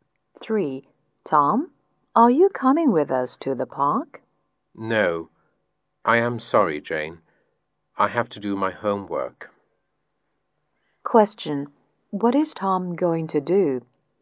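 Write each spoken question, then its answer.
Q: What is Tom going to do?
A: Do his homework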